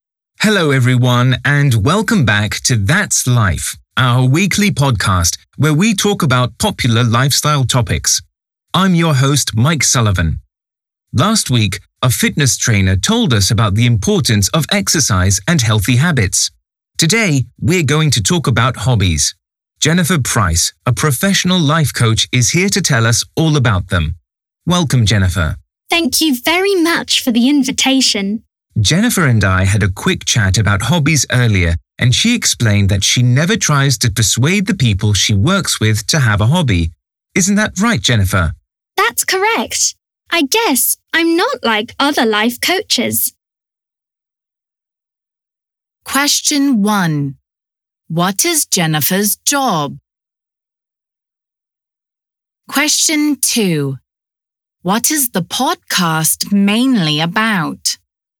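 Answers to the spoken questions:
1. a professional life coach
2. hobbies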